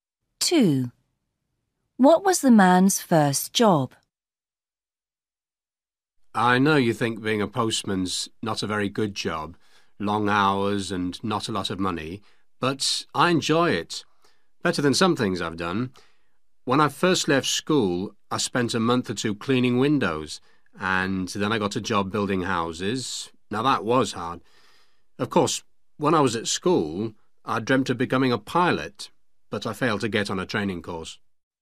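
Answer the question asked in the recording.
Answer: cleaning windows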